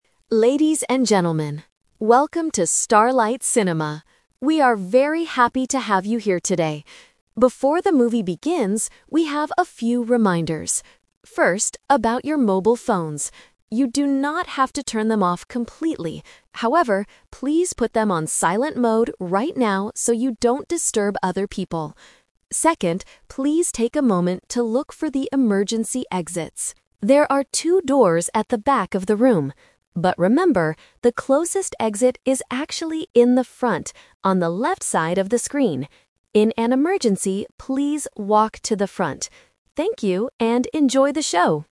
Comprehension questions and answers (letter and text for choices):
Listen to the announcement and choose the correct answer (A, B, or C) for each question.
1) What should the audience do with their mobile phones?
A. Turn them off completely.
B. Put them on silent mode.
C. Leave them outside the room.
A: B. Put them on silent mode.

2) Why should people silence their phones?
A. To save the battery.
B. Because the movie is very quiet.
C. So they don't disturb other people.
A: C. So they don't disturb other people.

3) Where is the closest emergency exit?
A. At the back of the room.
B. On the left side of the screen.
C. Outside the cinema.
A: B. On the left side of the screen.

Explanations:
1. The announcer says, "You do not have to turn them off completely" (Option A is the trap). "However, please put them on silent mode right now." Option C is not mentioned.
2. The announcer explicitly asks the audience to put phones on silent mode "so you don't disturb other people." Options A and B are plausible real-world reasons but are not mentioned in the audio.
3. The announcer mentions that there are two doors "at the back of the room" (Option A is the trap), "But remember, the closest exit is actually in the front, on the left side of the screen." Option C is not mentioned.

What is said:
PA Announcer: Ladies and gentlemen, welcome to Starlight Cinema. We are very happy to have you here today. Before the movie begins, we have a few reminders. First, about your mobile phones. You do not have to turn them off completely. However, please put them on silent mode right now so you don't disturb other people. Second, please take a moment to look for the emergency exits. There are two doors at the back of the room. But remember, the closest exit is actually in the front, on the left side of the screen. In an emergency, please walk to the front. Thank you, and enjoy the show!

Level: A2